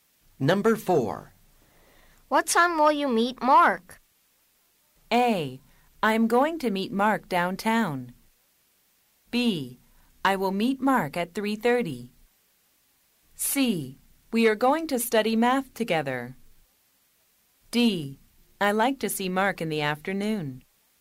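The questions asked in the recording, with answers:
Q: What time will you meet Mark?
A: B: I will meet Mark at 3:30.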